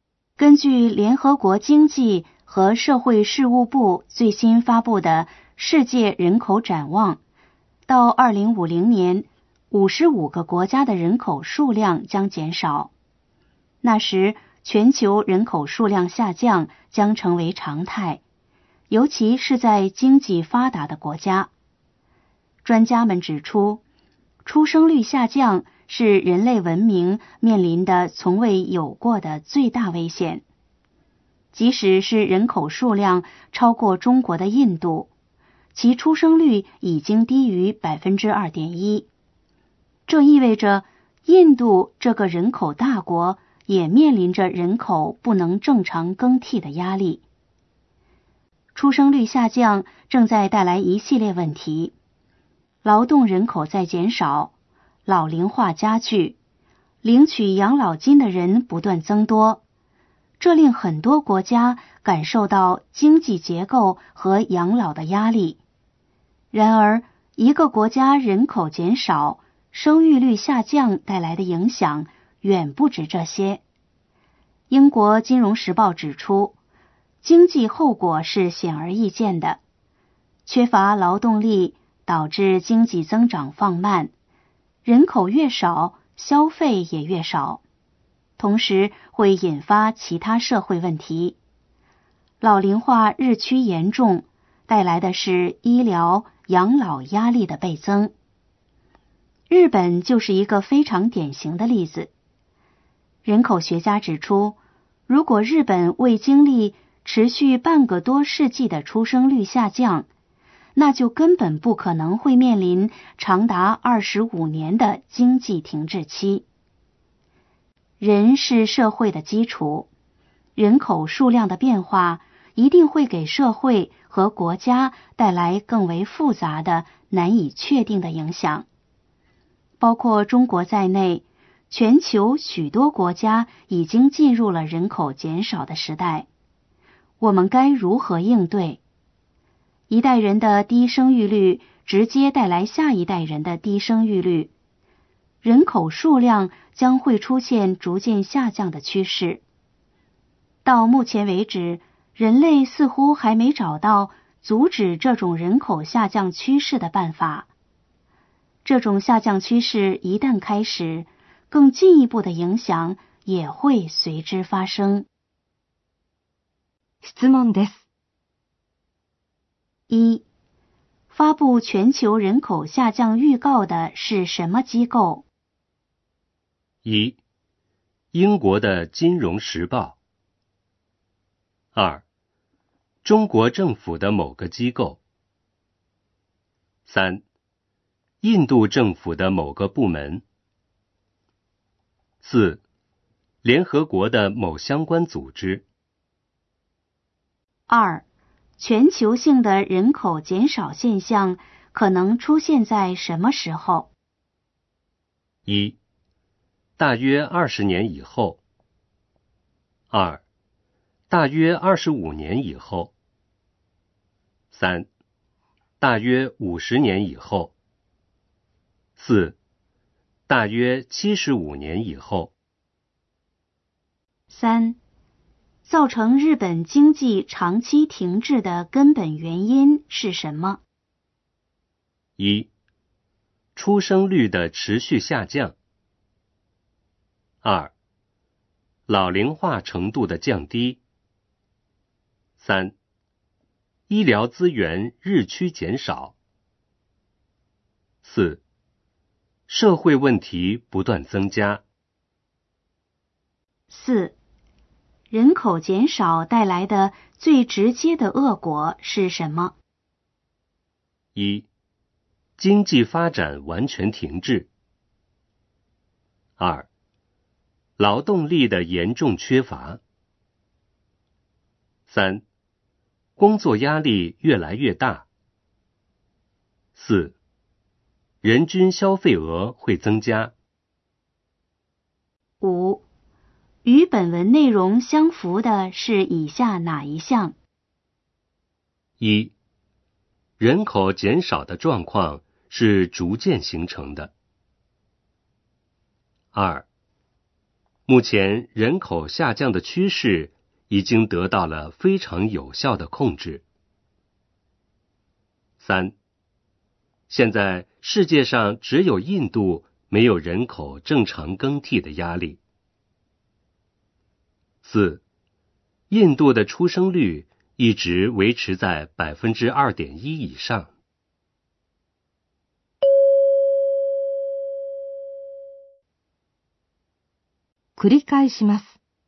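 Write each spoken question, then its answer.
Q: 发布全球人口下降预告的是什么机构?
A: 4: 联合国的某相关组织

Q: 造成日本经济长期停滞的根本原因是什么?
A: 1: 出生率的持续下降

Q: 人口减少带来的最直接的恶果是什么?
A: 2: 劳动力的严重缺乏

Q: 与本文内容相符的是以下哪一项?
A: 1: 人口减少的状况是逐渐形成的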